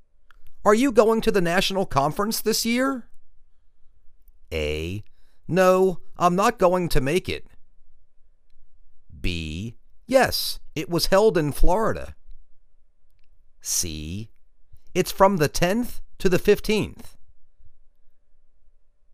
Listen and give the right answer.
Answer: No, I'm not going to make it.